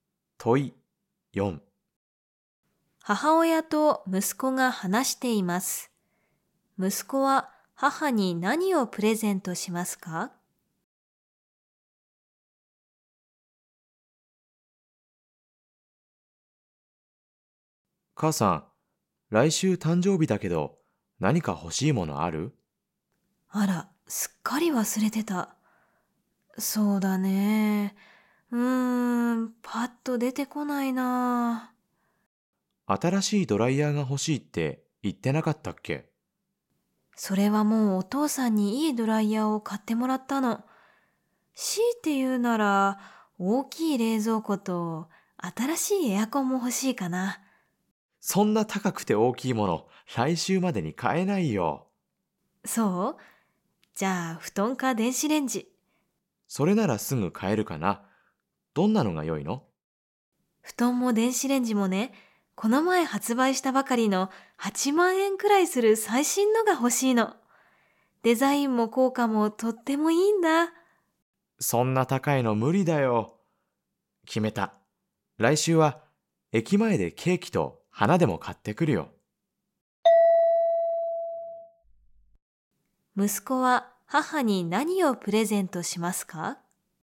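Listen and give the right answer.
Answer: ケーキと花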